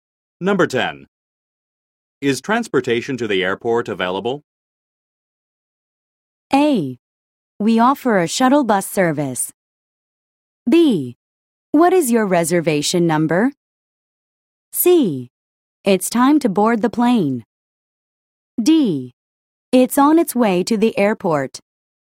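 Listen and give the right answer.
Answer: A: We offer a shuttle bus service.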